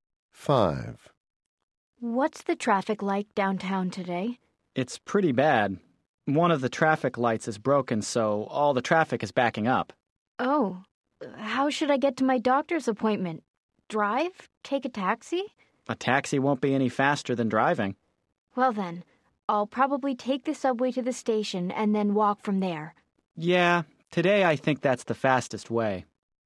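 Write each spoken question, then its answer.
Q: Oh, how should I get to my doctor's appointment?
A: By subway, then walk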